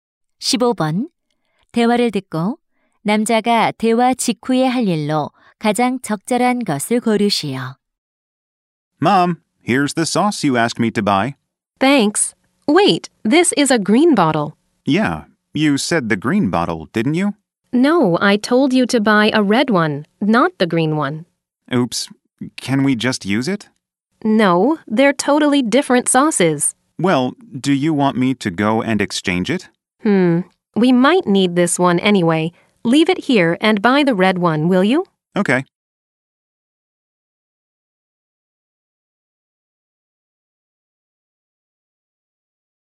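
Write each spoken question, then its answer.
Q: 대화를 듣고 남자가 대화 직후에 할 일로 가장 적절한 것을 고르시오.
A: 빨간 소스를 사러 가기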